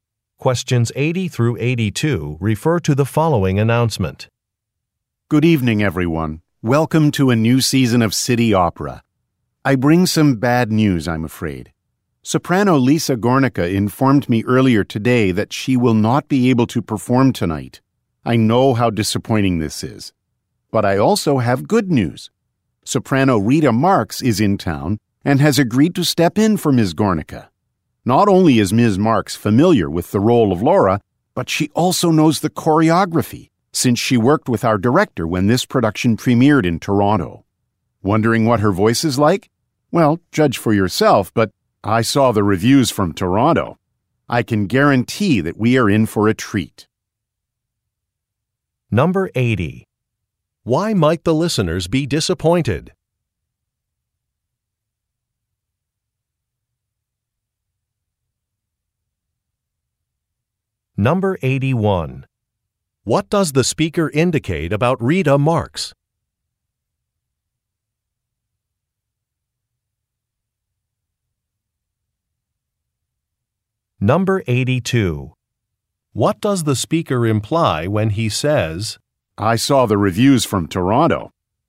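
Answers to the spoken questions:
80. The soprano Lisa Gornicka can't perform tonight
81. She knows the role of Laura and the choreography because she has performed in this production before
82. He is confident Rita Marx is an excellent singer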